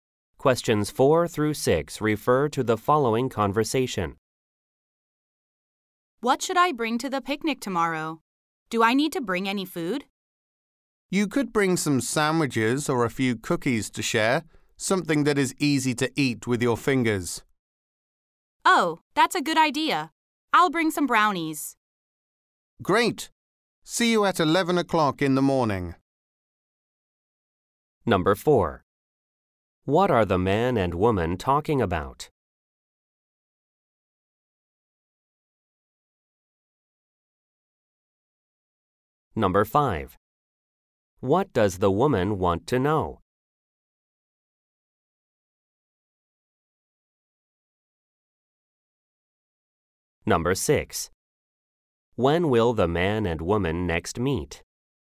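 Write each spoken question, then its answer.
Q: What are the man and woman talking about?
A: Food to bring to a picnic

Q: When will the man and woman next meet?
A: Tomorrow at 11 a.m.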